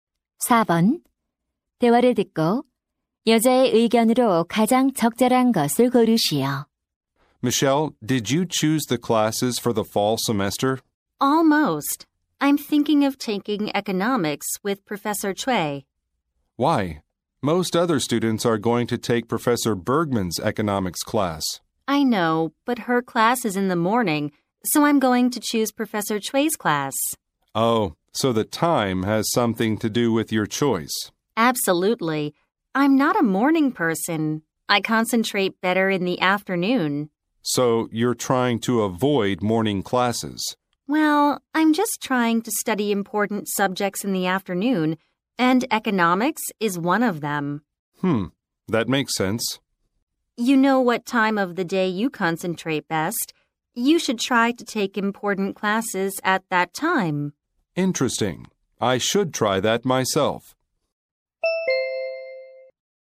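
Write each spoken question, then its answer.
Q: 대화를 듣고 여자의 의견으로 가장 적절한 것을 고르시오.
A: 가장 집중이 잘 되는 시간에 중요한 수업을 들어야 한다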